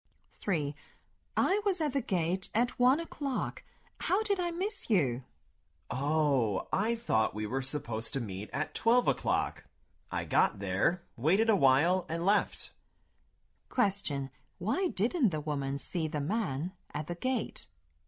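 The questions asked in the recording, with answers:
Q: Why didn't the woman see the man at the gate?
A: She went at the wrong time: she thought they were meeting at 12 o'clock, waited a while and left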